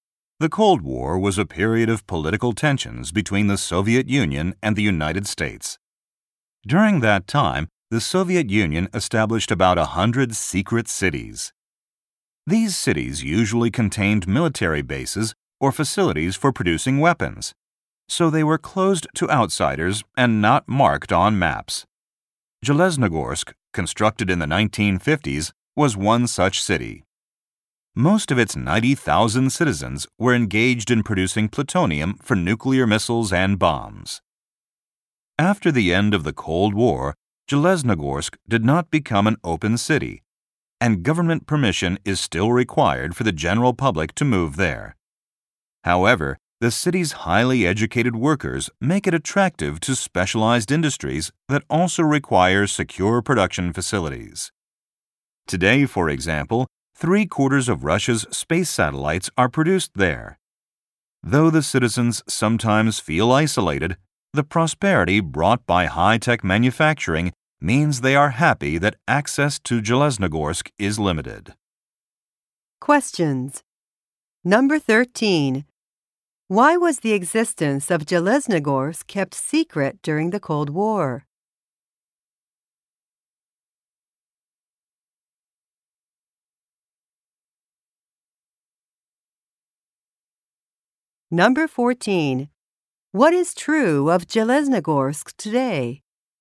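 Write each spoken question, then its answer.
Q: Why was the existence of Jeleznogorsk kept secret during the Cold War?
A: It produced plutonium for nuclear weapons.

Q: What is true of Jeleznogorsk today?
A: It makes most of Russia's space satellites, and access to it is still restricted.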